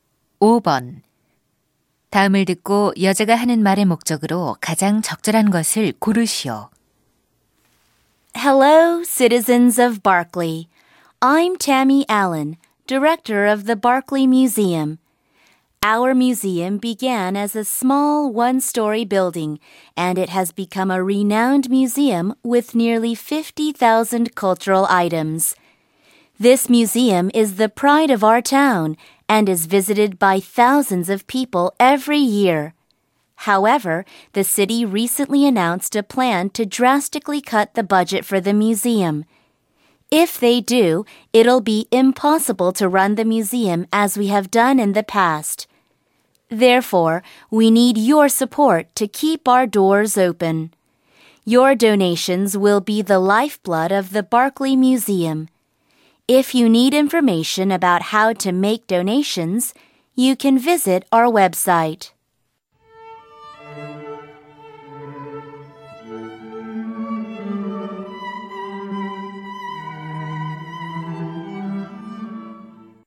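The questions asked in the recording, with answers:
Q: 다음을 듣고 여자가 하는 말의 목적으로 가장 적절한 것을 고르시오.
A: 박물관 운영을 위한 기부를 요청하려고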